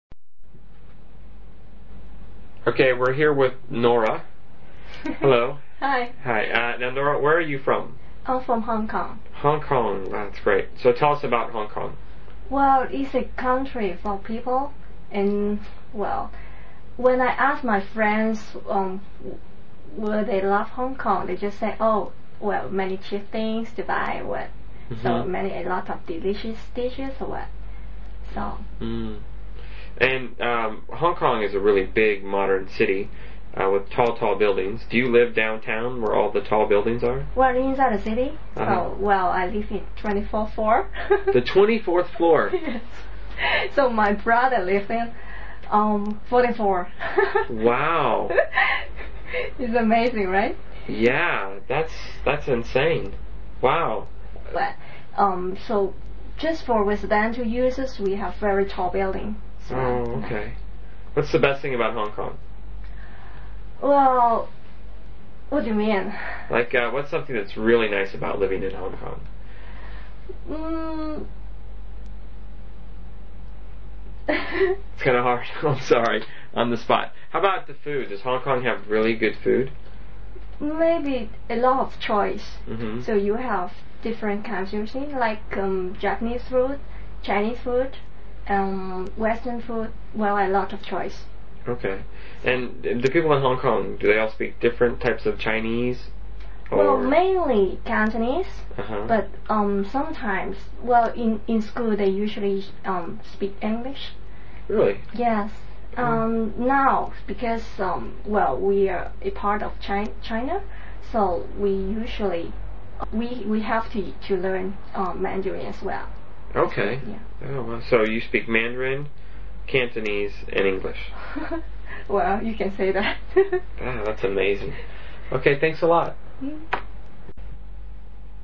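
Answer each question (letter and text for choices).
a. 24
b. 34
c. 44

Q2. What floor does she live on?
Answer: a. 24

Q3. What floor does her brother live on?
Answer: c. 44

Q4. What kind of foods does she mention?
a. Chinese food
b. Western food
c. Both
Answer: c. Both

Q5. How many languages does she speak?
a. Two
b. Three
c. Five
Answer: b. Three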